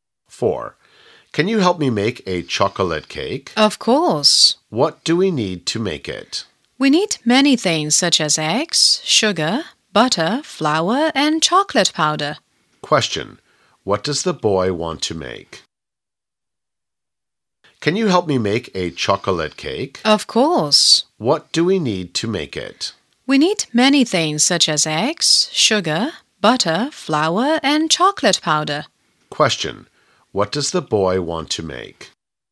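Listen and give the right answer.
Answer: A chocolate cake.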